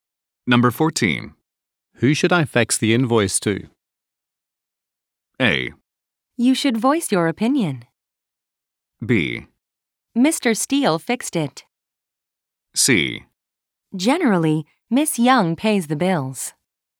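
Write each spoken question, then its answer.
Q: Who should I fax the invoice to?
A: C: Generally, Miss Young pays the bills.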